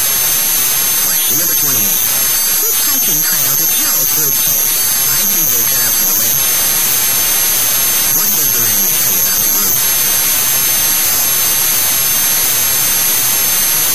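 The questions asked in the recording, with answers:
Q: What does the man tell you about the group?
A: They set out for the lake.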